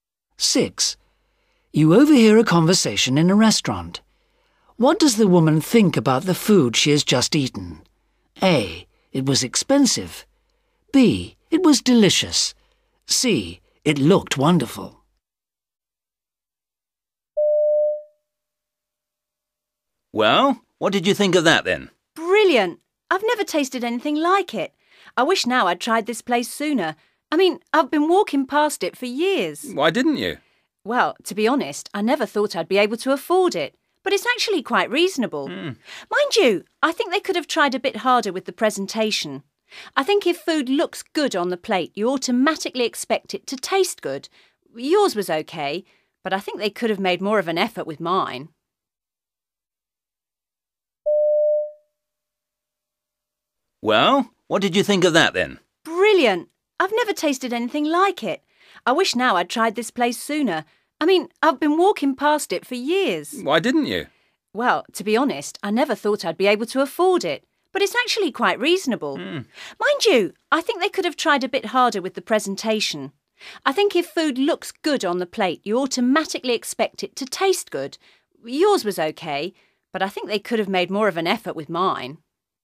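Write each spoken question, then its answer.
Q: What does the woman think about the food she has just eaten?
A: B: It was delicious.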